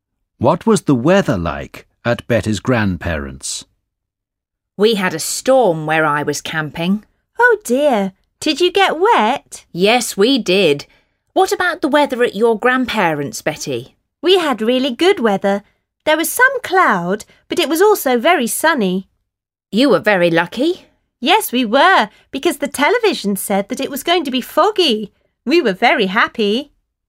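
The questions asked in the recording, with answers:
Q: What was the weather like at Betty's grandparents?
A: Sunny (with some cloud)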